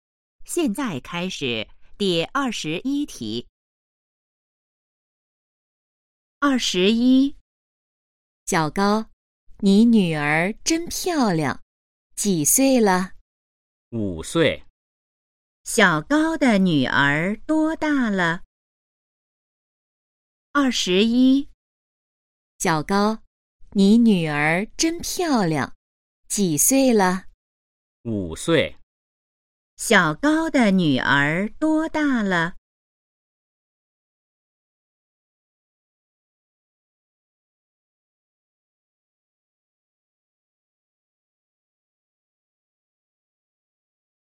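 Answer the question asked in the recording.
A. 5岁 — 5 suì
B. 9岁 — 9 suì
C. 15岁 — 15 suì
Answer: A. 5岁 — 5 suì

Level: HSK2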